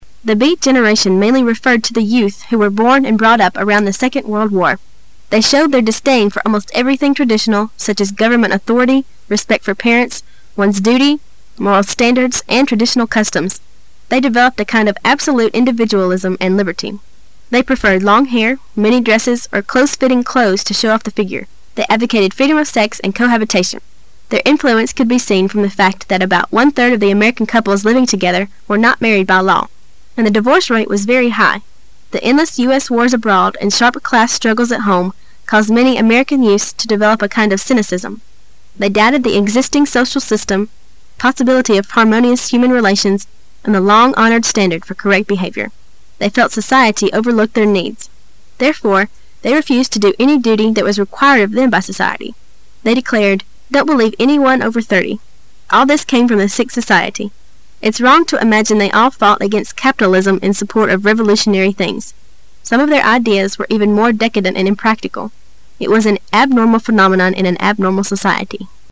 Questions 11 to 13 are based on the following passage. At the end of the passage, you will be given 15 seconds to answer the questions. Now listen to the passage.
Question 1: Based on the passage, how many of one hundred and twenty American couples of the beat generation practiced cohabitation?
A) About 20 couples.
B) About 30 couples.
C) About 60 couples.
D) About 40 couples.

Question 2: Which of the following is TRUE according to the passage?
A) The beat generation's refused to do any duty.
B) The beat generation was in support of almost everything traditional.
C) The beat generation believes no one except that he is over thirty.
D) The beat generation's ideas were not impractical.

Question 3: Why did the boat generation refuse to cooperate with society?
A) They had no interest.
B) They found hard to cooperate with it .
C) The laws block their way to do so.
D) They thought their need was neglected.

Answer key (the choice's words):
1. About 40 couples.
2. The beat generation's refused to do any duty.
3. They thought their need was neglected.

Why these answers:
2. [解析] 本题测试的是对文章的理解。 [详细解答] 根据整篇文章,可以看出只有A是真实的,而文章中也有原句为证"they refused to do any duty that was required of them by society."。
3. [解析] 本题测试的是文章的细节部分。 [详细解答] They felt society overlooked their needs. Therefore,they refused to do any duty that was re-quired of them by society. They declared"Don't believe anyone over thirty",从此句中,我们不难看出他们拒绝与社会合作的原因正是因为他们认为社会忽视了他们需要。

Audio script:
[解析] 11-13 The beat generation mainly referred to the youth who were born and brought up around the Second World War. They showed their disdain for almost everything traditional, such as government authority, respect for parents, one's duty, moral standards, and traditional customs. They developed a kind of absolute individualism and liberty. They preferred long hair, mini-dresses or close-fitting clothes to show off tile figure. They advocated freedom of sex and cohabitation. Their influence could be seen from the fact that about one third of the American couples living together were not married by law. And the divorce rate was very high. The endless U. S wars abroad and sharp class struggle at home caused many American youths to develop a kind of cynicism. They doubted the existing social system, possibility of harmonious human relations, and the long-honored standard for correct behavior. They felt society overlook their needs. Therefore, they refused to do any duty that was required of them by society. They declared "Don't believe anyone over thirty". All this came from the sick society. It's wrong to imagine they all fought against capitalism in support of revolutionary things. Some of their ideas were even more decadent and impractical. It was an abnormal phenomenon in an abnormal society.